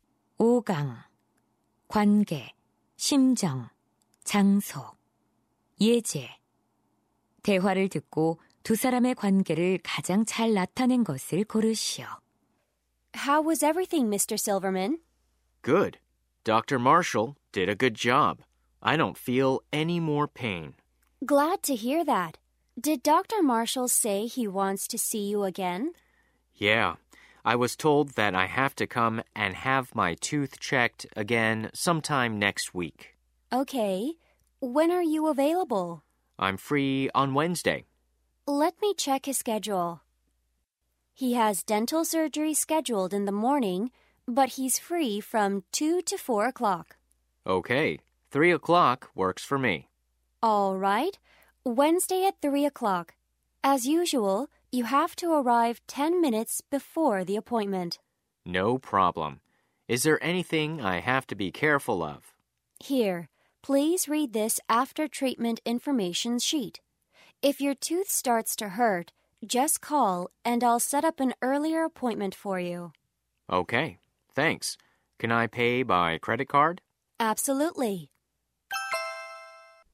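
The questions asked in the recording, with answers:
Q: 대화를 듣고 두 사람의 관계를 가장 잘 나타낸 것을 고르시오.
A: 치과 접수 직원 - 환자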